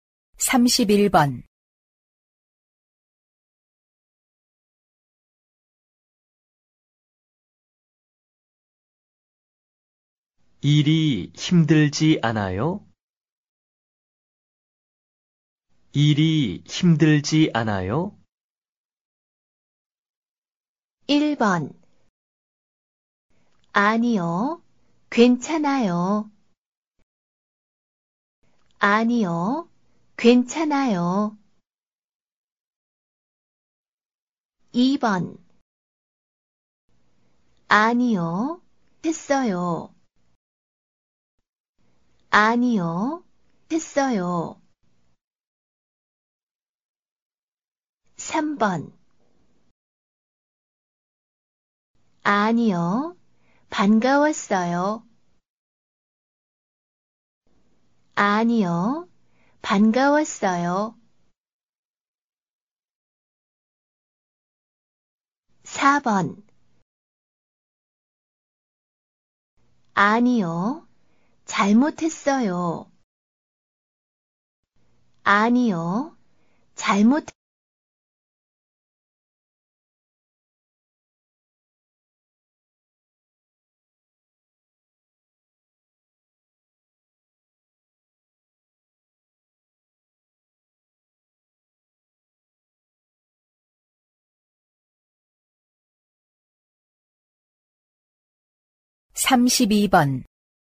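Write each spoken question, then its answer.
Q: 일이 힘들지 않아요?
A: 1: 아니요. 괜찮아요.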